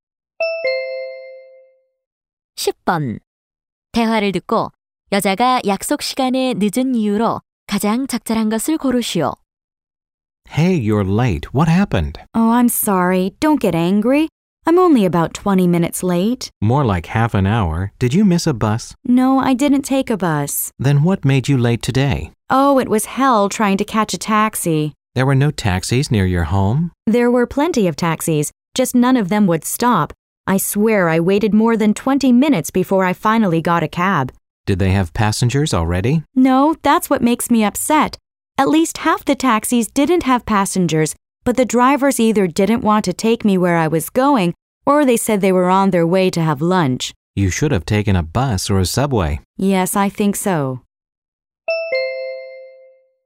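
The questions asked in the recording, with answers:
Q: 대화를 듣고 여자가 약속 시간에 늦은 이유로 가장 적절한 것을 고르시오.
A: 택시를 잡기 어려워서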